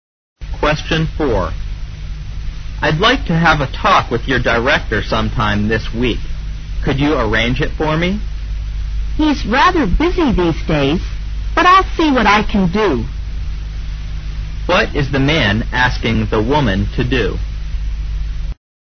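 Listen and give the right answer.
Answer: Arrange a talk with her director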